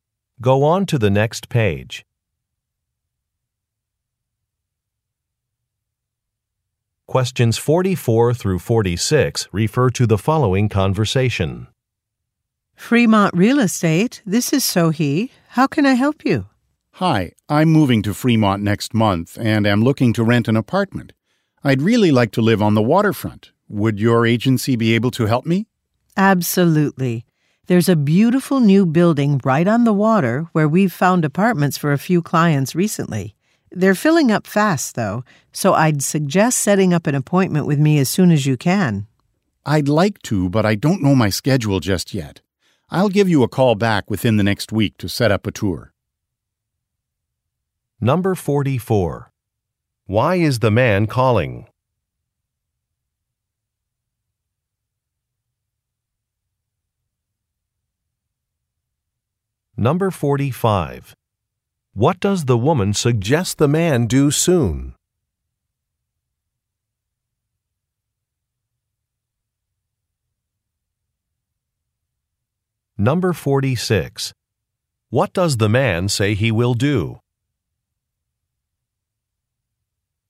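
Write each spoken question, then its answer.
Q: Why is the man calling?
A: To find an apartment to rent

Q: What does the woman suggest the man do soon?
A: Make an appointment with her

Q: What does the man say he will do?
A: Call back within the next week to set up a tour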